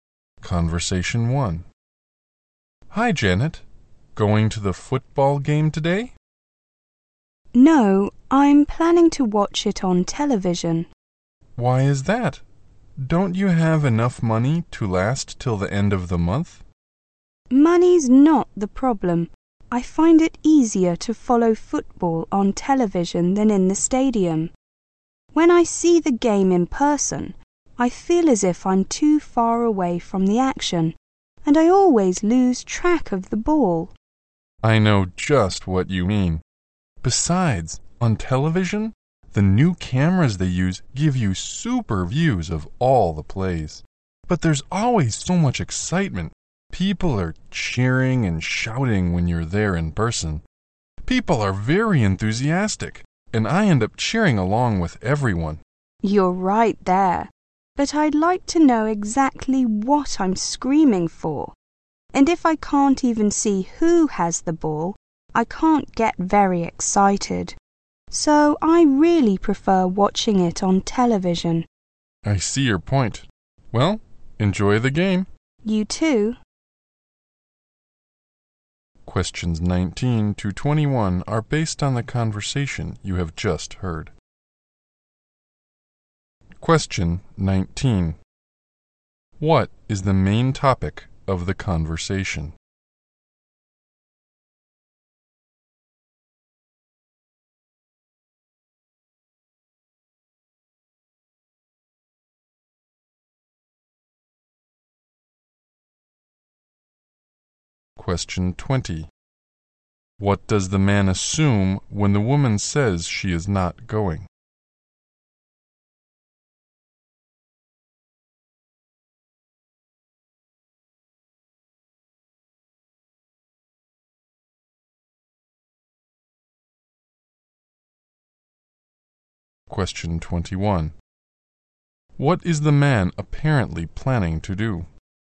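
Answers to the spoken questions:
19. Watching football on TV versus in the stadium
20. She doesn't have enough money
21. Go to the game at the stadium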